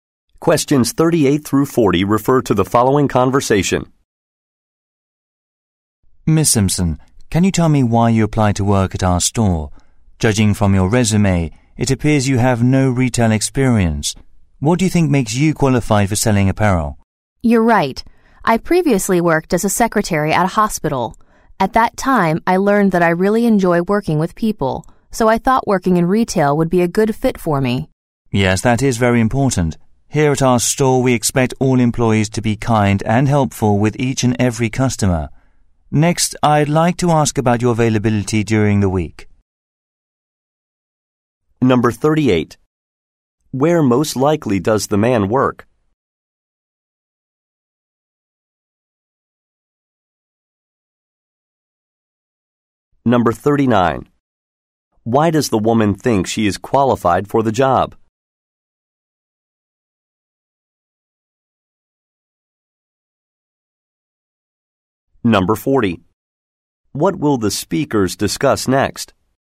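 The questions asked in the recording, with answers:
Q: Where most likely does the man work?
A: At a clothing store

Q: Why does the woman think she is qualified for the job?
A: She enjoys working with people

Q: What will the speakers discuss next?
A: The woman's availability during the week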